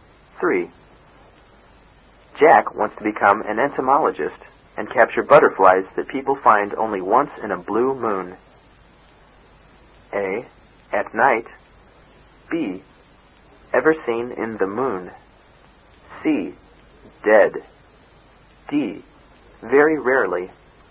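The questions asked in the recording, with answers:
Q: Jack wants to become an entomologist and capture butterflies that people find only once in a blue moon.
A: D: Very rarely.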